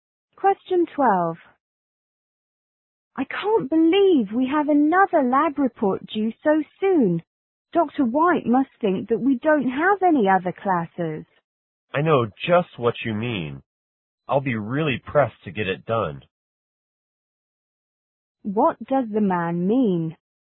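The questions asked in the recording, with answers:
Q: What does the man mean?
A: He agrees with her and will also find it hard to finish the report in time.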